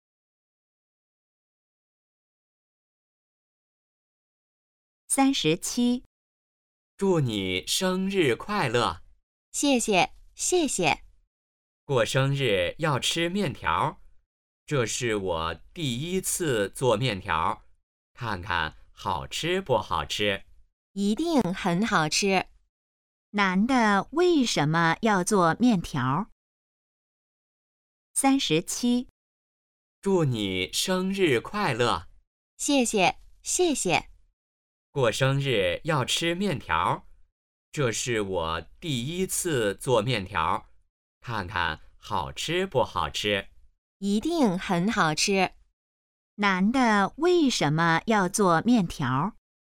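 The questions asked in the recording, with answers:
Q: 男的为什么要做面条?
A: 女的过生日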